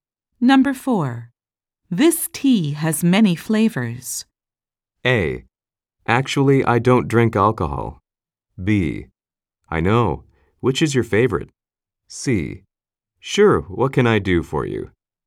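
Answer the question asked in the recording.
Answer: B: I know. Which is your favorite?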